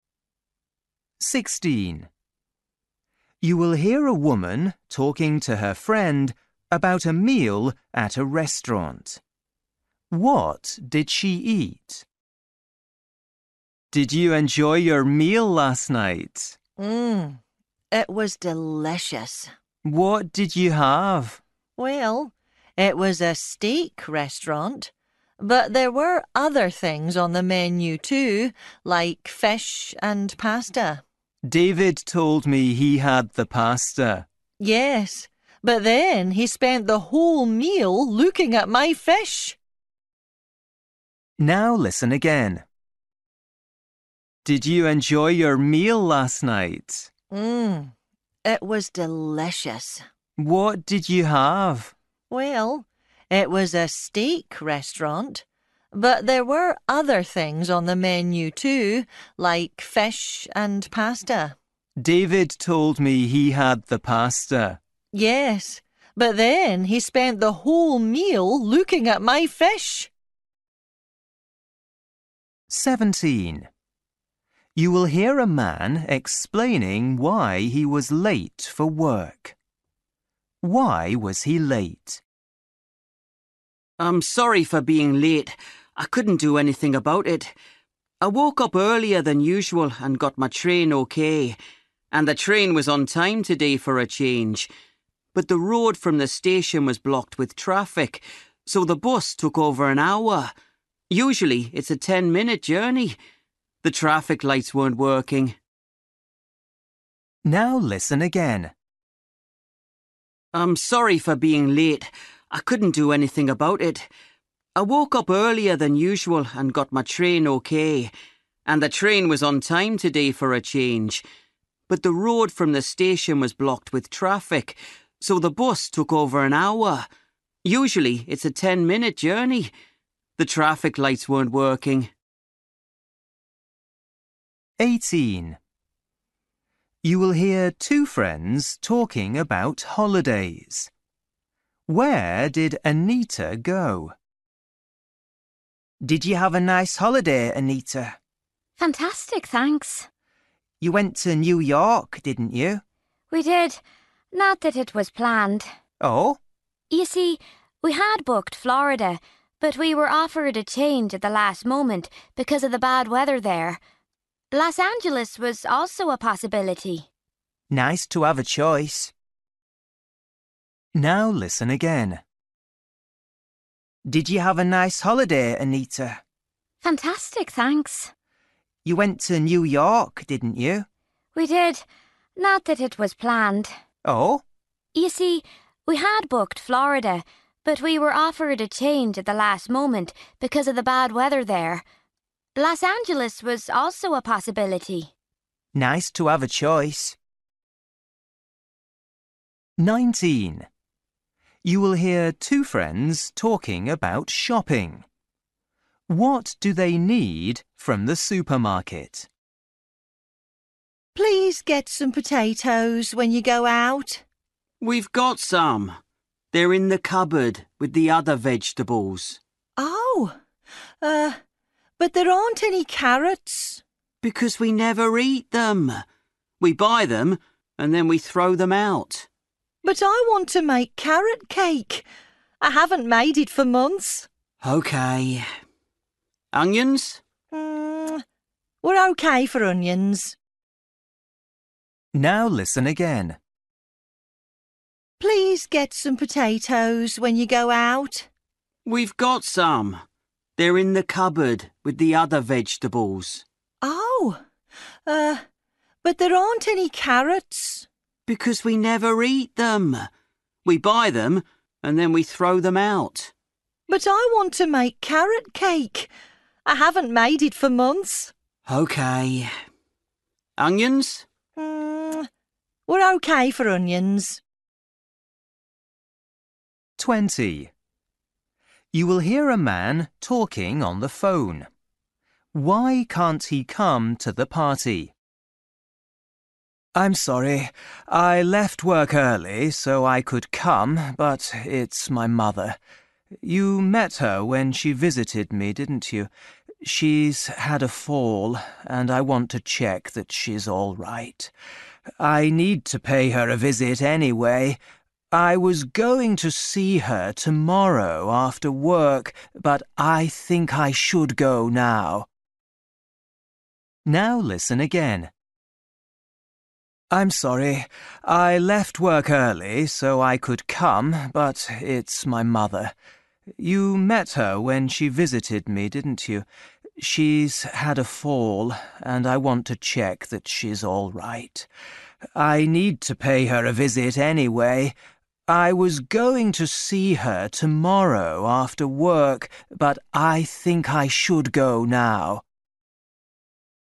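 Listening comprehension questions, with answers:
For each question, choose the correct answer.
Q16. You will hear a woman talking to her friend about a meal at a restaurant. What did she eat?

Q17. You will hear a man explaining why he was late for work. Why was he late?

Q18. You will hear two friends talking about holidays. Where did Anita go?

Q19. You will hear two friends talking about shopping. What do they need from the supermarket?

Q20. You will hear a man talking on the phone. Why can't he come to the party?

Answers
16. fish
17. The bus was stuck in traffic because the traffic lights weren't working
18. New York
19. carrots
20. His mother has had a fall and he wants to visit her

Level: Luyện nghe trình độ A2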